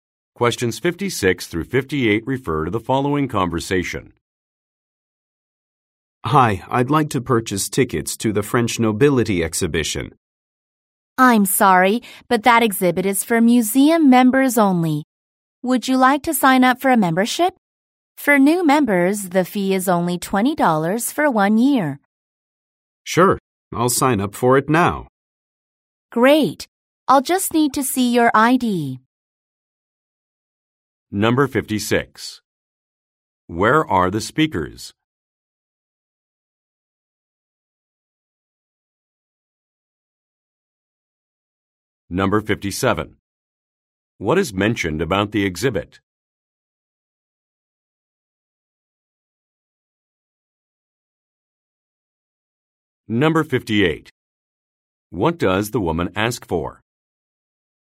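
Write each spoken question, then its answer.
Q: Where are the speakers?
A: At a museum

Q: What is mentioned about the exhibit?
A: It is for members only

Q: What does the woman ask for?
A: ID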